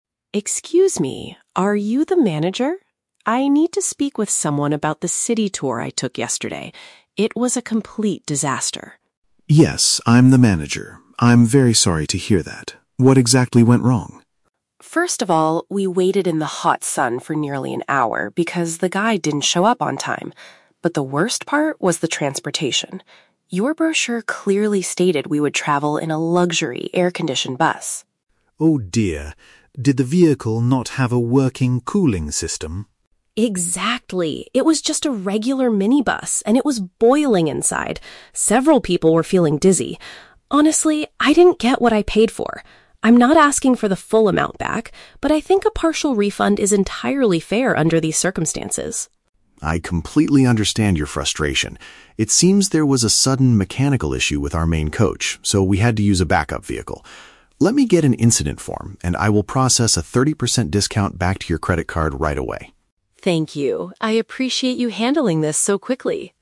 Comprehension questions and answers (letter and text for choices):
Listen to the conversation between a tourist and a tour agency manager. Choose the correct answer (A, B, or C) for each question.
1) Why is the tourist mainly complaining?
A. The tour guide was impolite to the passengers.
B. The vehicle did not match the company's advertisement.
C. The city tour started an hour earlier than scheduled.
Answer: B. The vehicle did not match the company's advertisement.

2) What problem did the passengers experience on the bus?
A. It was extremely hot inside the vehicle.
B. There were not enough seats for everyone.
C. The bus broke down in the middle of the city.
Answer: A. It was extremely hot inside the vehicle.

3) What does the tourist want the manager to do?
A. Return all the money he paid for the trip.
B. Give him back some of the money he spent.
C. Fire the tour guide who arrived late yesterday.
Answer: B. Give him back some of the money he spent.

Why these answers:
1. The tourist says the "brochure clearly stated" they would have a luxury bus, but they got a "regular minibus." This means the vehicle did not match the advertisement.
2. The tourist says the bus did not have a "working cooling system" and it was "boiling inside." "Boiling" is a strong synonym for "extremely hot."
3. The tourist says, "I think a partial refund is entirely fair." A partial refund means getting some money back, which matches option (B).

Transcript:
Tourist: Excuse me, are you the manager? I need to speak with someone about the city tour I took yesterday. It was a complete disaster.
Manager: Yes, I'm the manager. I'm very sorry to hear that. What exactly went wrong?
Tourist: First of all, we waited in the hot sun for nearly an hour because the guide didn't show up on time. But the worst part was the transportation. Your brochure clearly stated we would travel in a luxury, air-conditioned bus.
Manager: Oh, dear. Did the vehicle not have a working cooling system?
Tourist: Exactly! It was just a regular minibus, and it was boiling inside. Several people were feeling dizzy. Honestly, I didn't get what I paid for. I'm not asking for the full amount back, but I think a partial refund is entirely fair under these circumstances.
Manager: I completely understand your frustration. It seems there was a sudden mechanical issue with our main coach, so we had to use a backup vehicle. Let me get an incident form, and I will process a 30% discount back to your credit card right away.